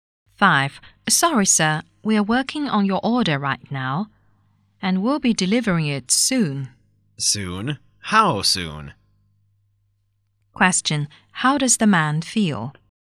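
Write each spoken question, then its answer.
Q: How does the man feel?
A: Impatient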